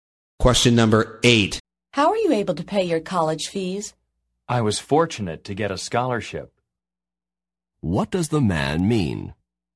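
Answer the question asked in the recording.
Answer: A scholarship pays his college fees.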